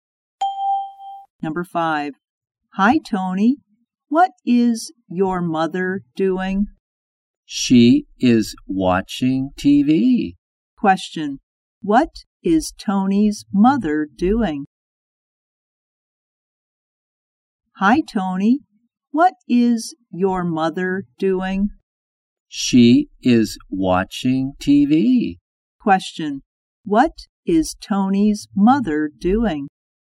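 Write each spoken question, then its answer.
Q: What is Tony's mother doing?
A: Watching TV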